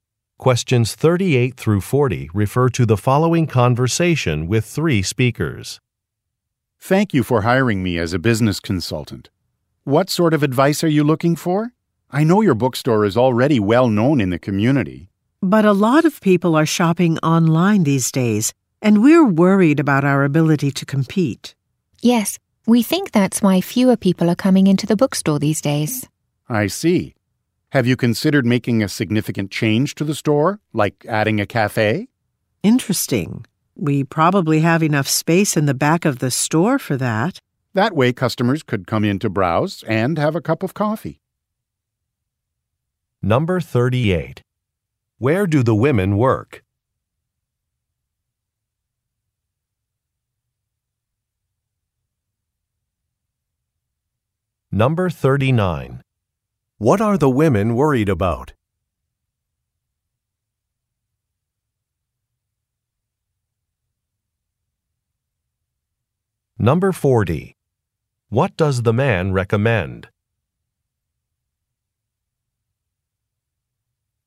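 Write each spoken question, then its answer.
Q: Where do the women work?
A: At a bookstore

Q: What are the women worried about?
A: Competing with online shopping

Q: What does the man recommend?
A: Adding a cafe to the store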